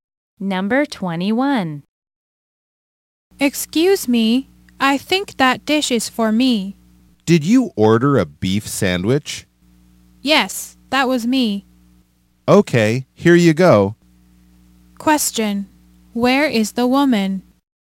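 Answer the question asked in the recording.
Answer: At a restaurant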